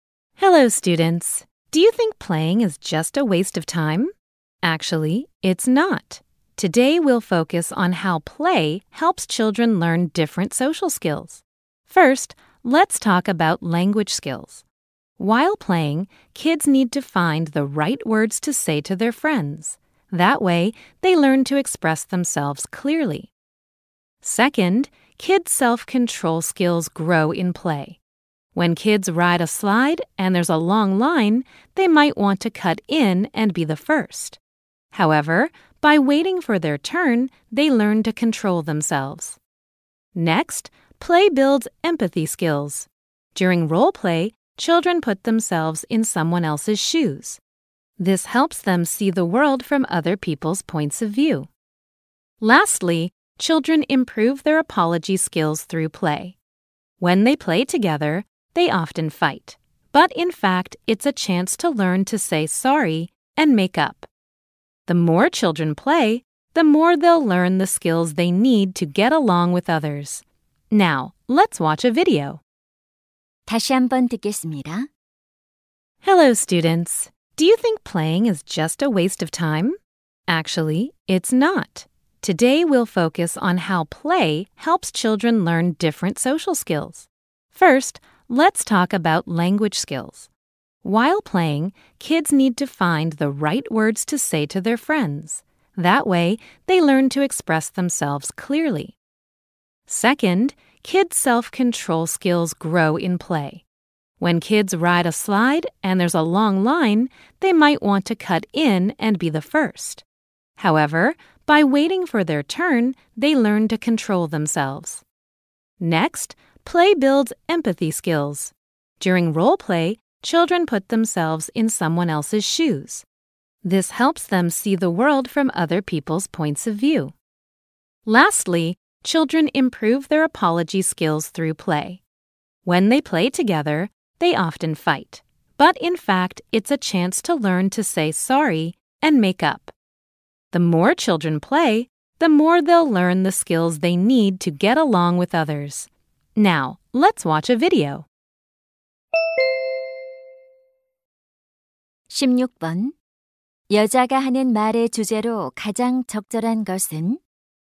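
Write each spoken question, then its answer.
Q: 여자가 하는 말의 주제로 가장 적절한 것은?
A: 놀이가 아이들의 다양한 사회적 기술 학습에 도움이 되는 방식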